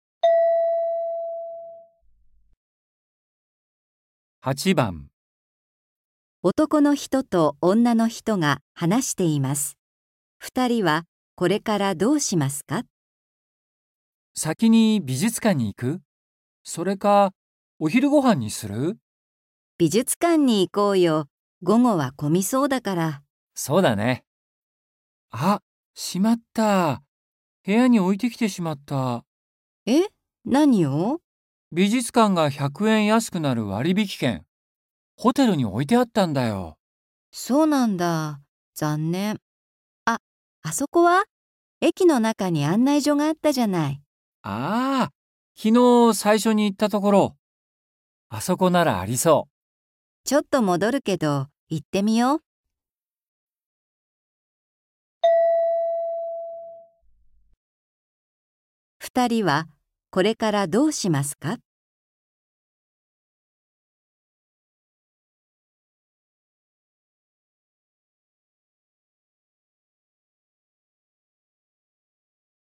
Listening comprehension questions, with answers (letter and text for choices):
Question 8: 二人は、これからどうしますか。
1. 駅に行く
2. ホテルに戻る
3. 絵を見る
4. 食事をする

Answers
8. 1. 駅に行く

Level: 初級